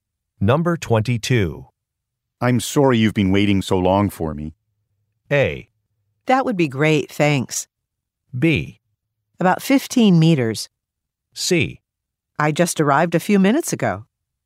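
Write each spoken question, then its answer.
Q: I'm sorry you've been waiting so long for me.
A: C: I just arrived a few minutes ago.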